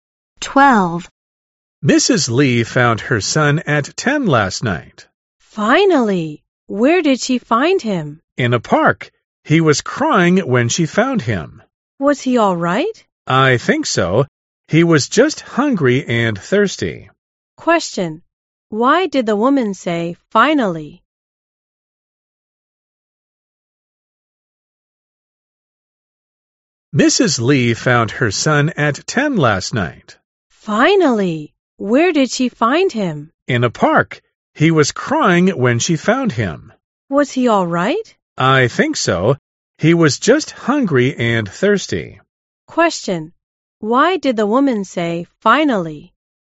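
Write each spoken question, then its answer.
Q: Why did the woman say, finally?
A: Because Mrs. Lee's son had been missing, and he was finally found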